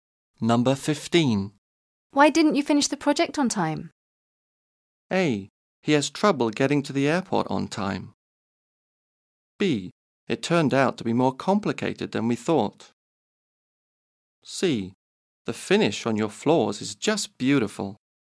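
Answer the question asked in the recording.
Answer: B: It turned out to be more complicated than we thought.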